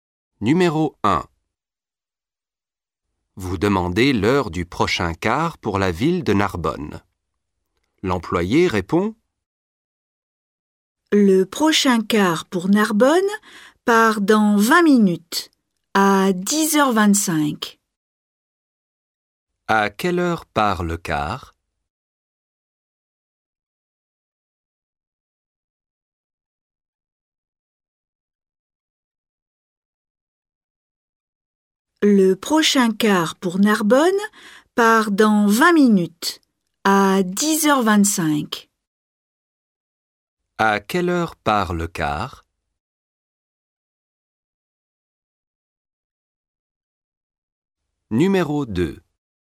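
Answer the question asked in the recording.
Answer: À 10h25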